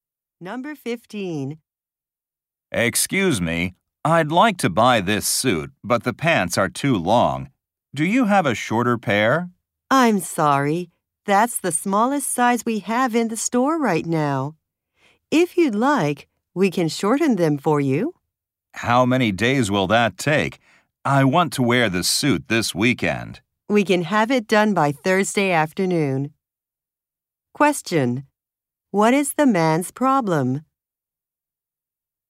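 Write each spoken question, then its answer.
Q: What is the man's problem?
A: The suit pants are too long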